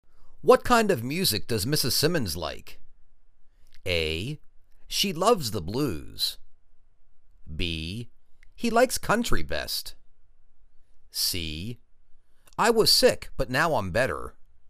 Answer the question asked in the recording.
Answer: She loves the blues.